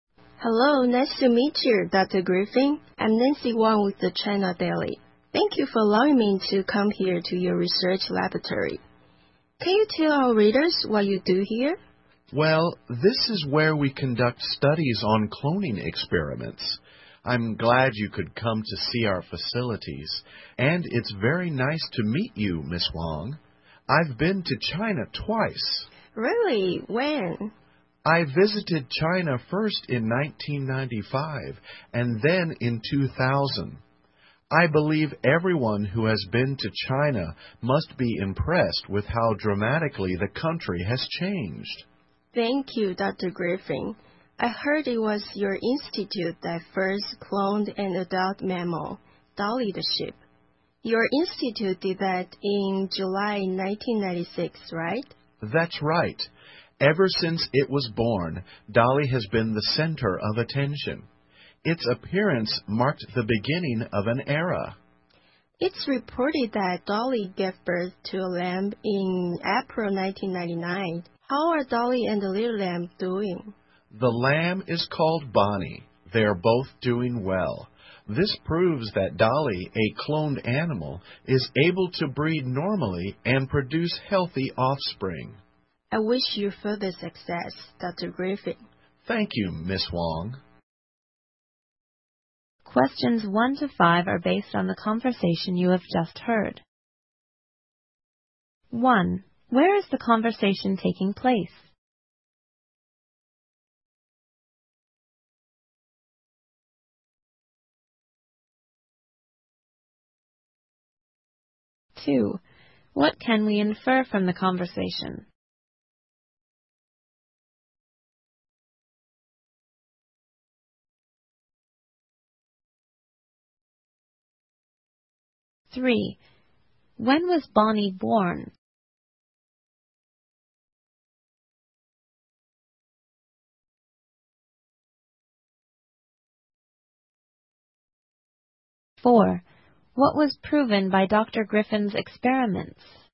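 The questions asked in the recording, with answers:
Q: Where is the conversation taking place?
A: In Dr. Griffin's research laboratory

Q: When was Bonnie born?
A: In April 1999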